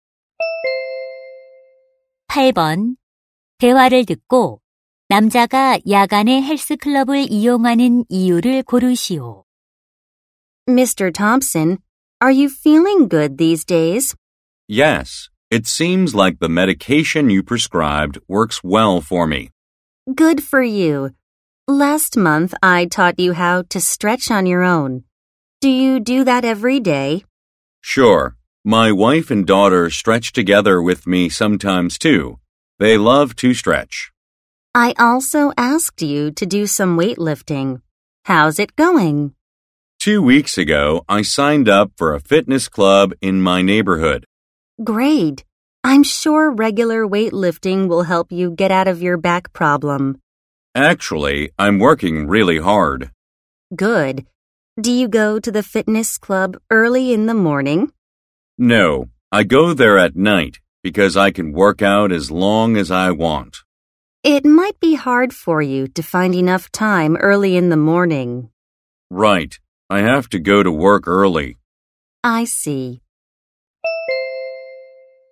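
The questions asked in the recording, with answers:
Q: 대화를 듣고 남자가 야간에 헬스클럽을 이용하는 이유를 고르시오.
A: 원하는 만큼 오래 운동할 수 있어서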